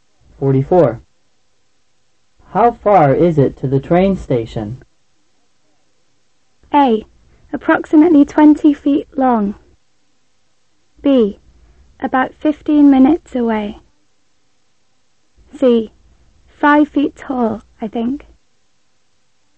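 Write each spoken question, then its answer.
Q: How far is it to the train station?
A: B: About 15 minutes away.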